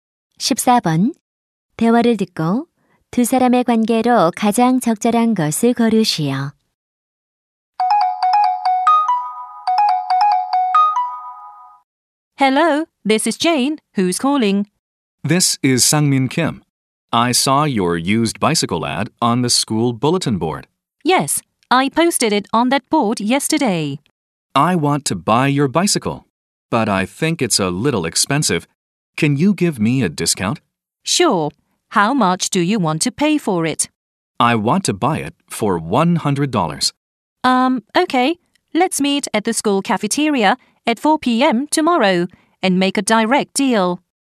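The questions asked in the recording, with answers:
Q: 대화를 듣고 두 사람의 관계로 가장 적절한 것을 고르시오.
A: 중고 자전거 판매자와 구매자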